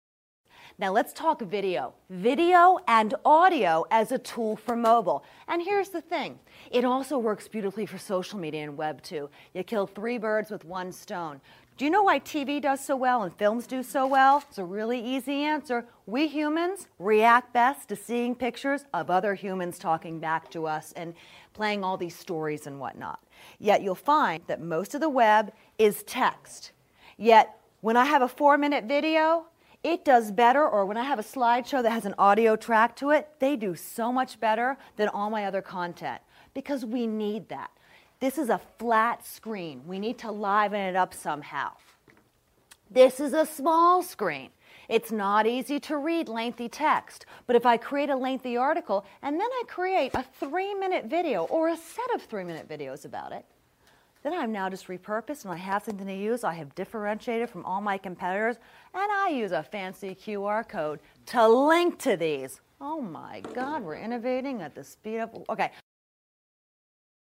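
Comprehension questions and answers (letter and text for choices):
Sample: Listen to the recording and answer the multiple-choice question by selecting the correct response. Only one response is correct.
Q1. According to the speaker, the main reason why TV and films work so well is that ____.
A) People are not interested in web and slides.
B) Most of us enjoy audio tracks and videos.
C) We humans respond best to video and audio.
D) We are differentiated from all competitors.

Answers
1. C) We humans respond best to video and audio.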